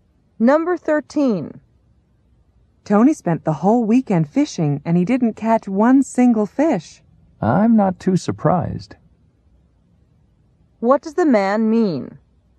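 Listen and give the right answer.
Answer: He expected Tony not to catch any fish.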